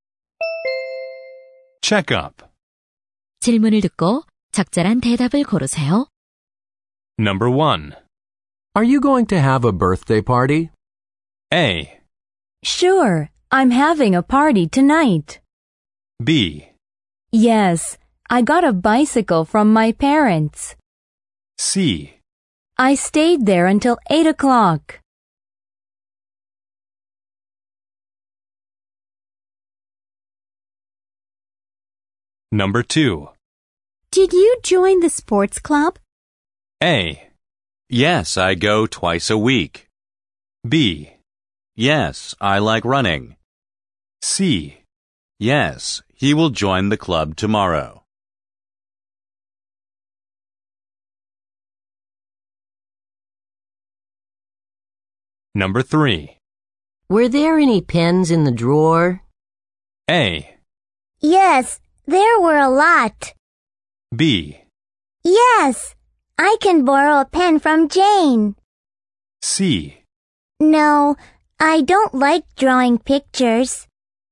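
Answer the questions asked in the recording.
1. A: Sure, I'm having a party tonight.
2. A: Yes, I go twice a week.
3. A: Yes, there were a lot.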